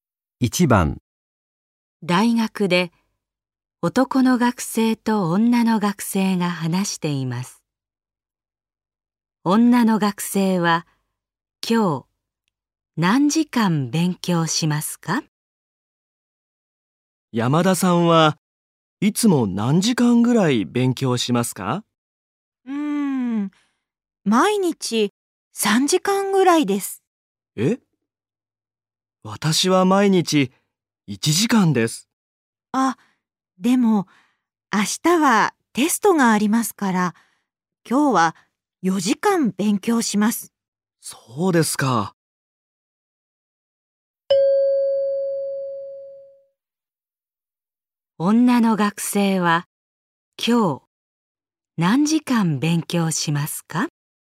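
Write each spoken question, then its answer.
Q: 女の学生は今日何時間勉強しますか?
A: 4時間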